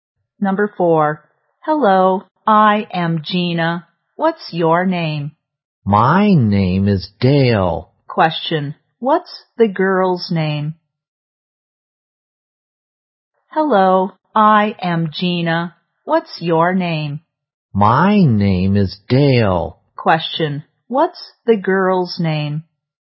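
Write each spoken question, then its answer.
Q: What's the girl's name?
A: Gina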